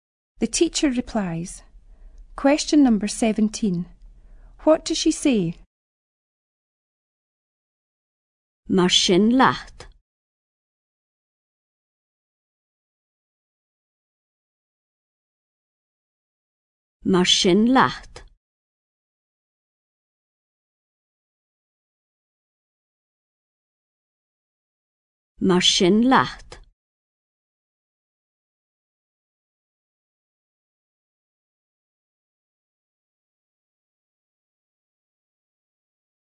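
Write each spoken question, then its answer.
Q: What does she say?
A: Goodbye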